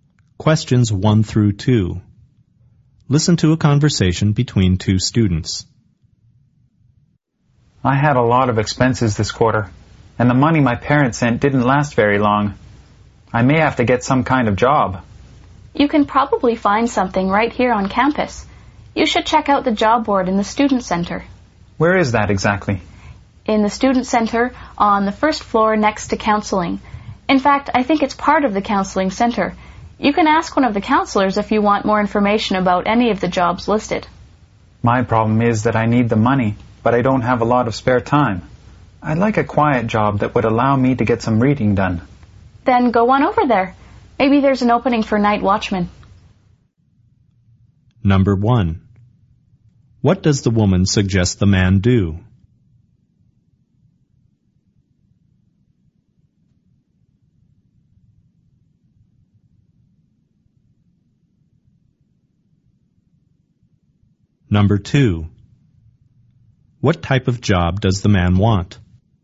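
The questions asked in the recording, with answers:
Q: What does the woman suggest the man do?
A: Check the job board in the student center

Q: what type of job does the man want?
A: A quiet job that lets him read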